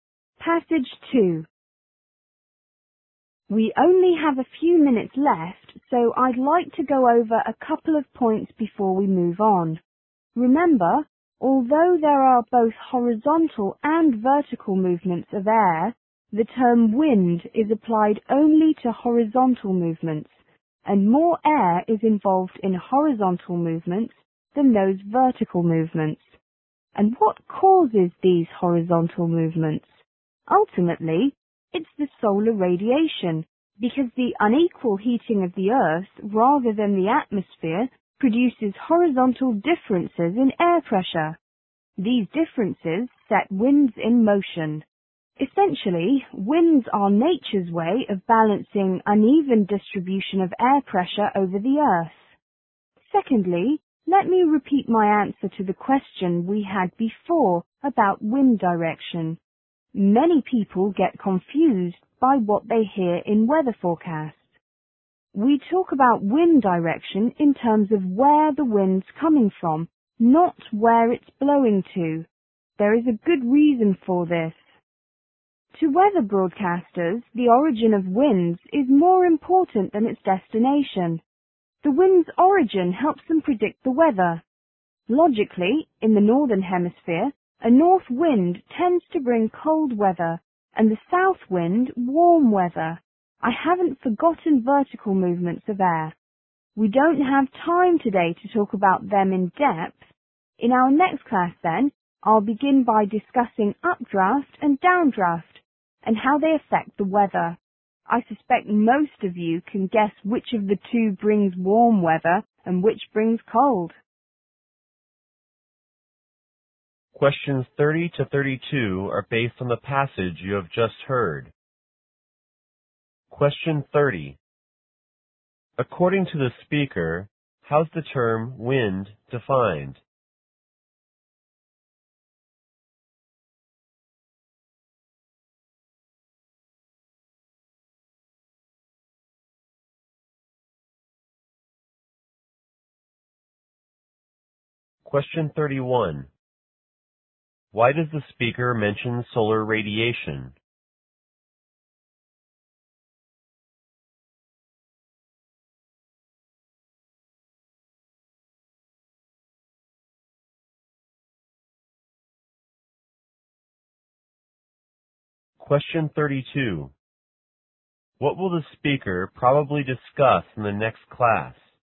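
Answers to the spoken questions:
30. As horizontal movements of air.
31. To explain what ultimately causes the horizontal movements of air.
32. Updrafts and downdrafts, which are vertical movements of air, and how they affect the weather.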